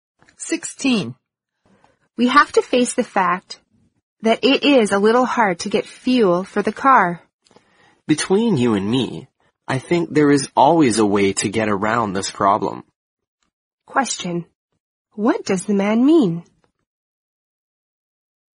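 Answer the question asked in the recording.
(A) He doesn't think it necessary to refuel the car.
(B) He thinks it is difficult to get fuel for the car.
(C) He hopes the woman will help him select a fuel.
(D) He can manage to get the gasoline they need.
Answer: (D) He can manage to get the gasoline they need.

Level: 四级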